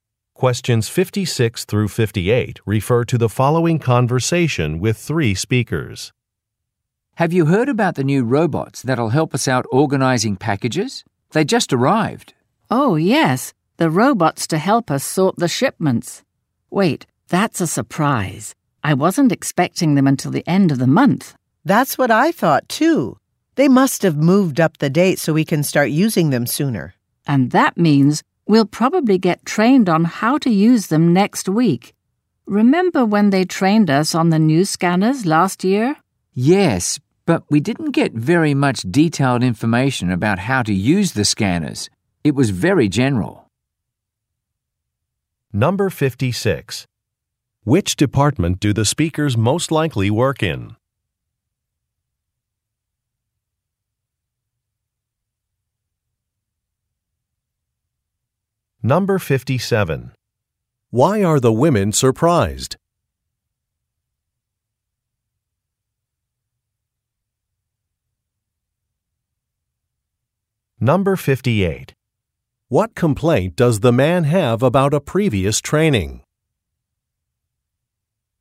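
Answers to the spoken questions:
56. Shipping / package sorting
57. The robots arrived earlier than expected
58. It was too general and lacked detailed information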